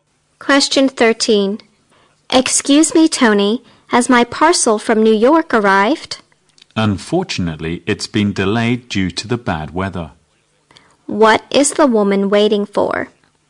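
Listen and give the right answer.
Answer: A parcel from New York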